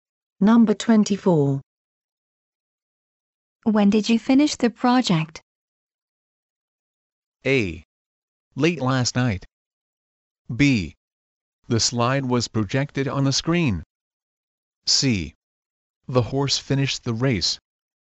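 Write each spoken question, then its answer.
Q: When did you finish the project?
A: A: Late last night.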